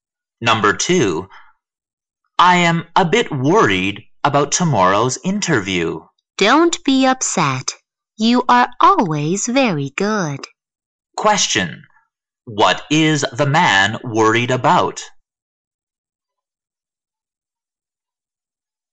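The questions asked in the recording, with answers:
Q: Question. What is the man worried about?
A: Tomorrow's interview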